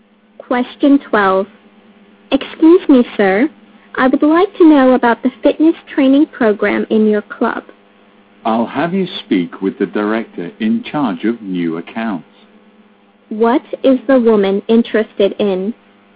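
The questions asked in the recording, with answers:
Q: What is the woman interested in?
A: The club's fitness training program.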